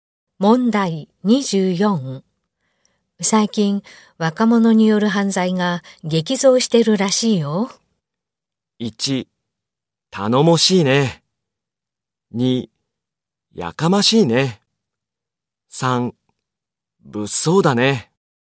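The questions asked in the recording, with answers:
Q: 最近、若者による犯罪が激増してるらしいよ。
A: 3: 物騒だね。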